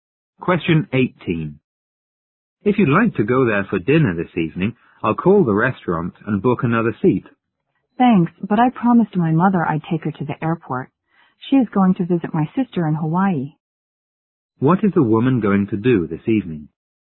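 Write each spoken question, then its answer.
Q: What is the woman going to do this evening?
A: Take her mother to the airport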